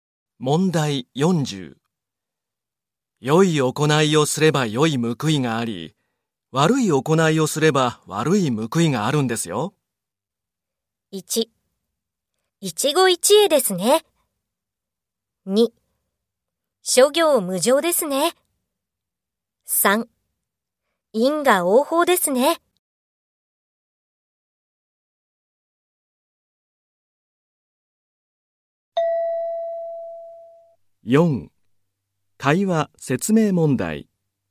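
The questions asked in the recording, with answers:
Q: 良い行いをすれば良い報いがあり、悪い行いをすれば悪い報いがあるんですよ。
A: 3: 因果応報ですね。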